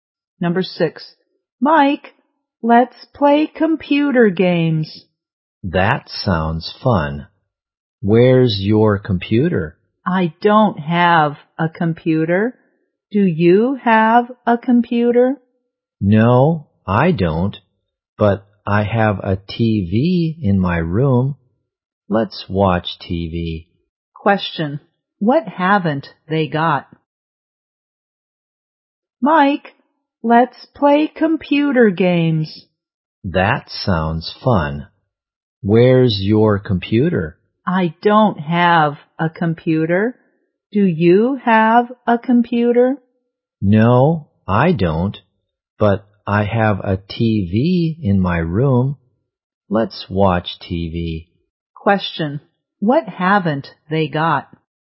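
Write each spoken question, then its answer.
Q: what haven't they got?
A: A computer.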